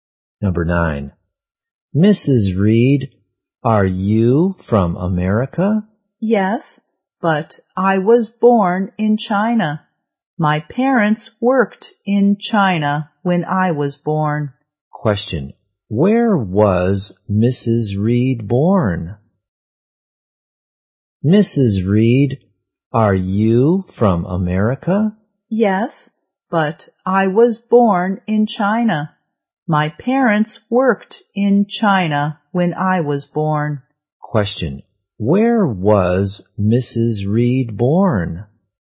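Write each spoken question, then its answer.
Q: Where was Mrs. Reed born?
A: In China.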